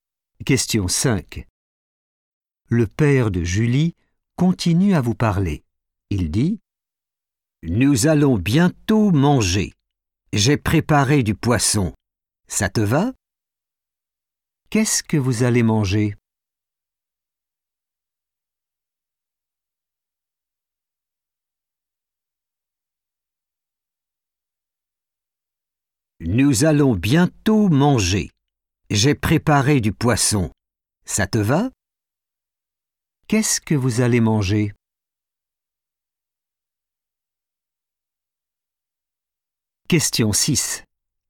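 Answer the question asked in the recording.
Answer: du poisson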